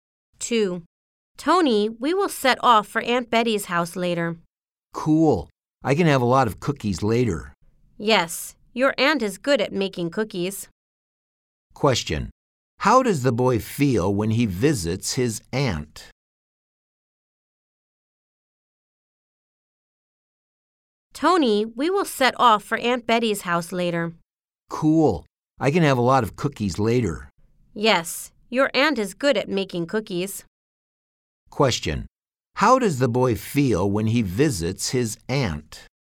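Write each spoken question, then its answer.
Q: Question. How does the boy feel when he visits his aunt?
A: Happy and excited (he can eat a lot of cookies).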